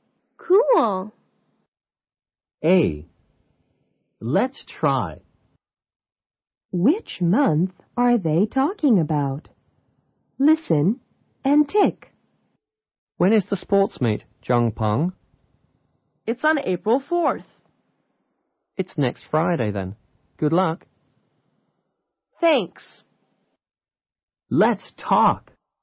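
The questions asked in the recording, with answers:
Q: Which month are they talking about?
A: April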